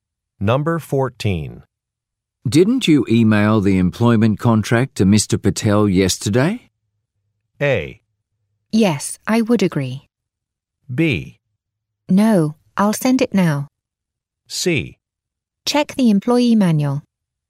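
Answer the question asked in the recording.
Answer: B: No, I'll send it now.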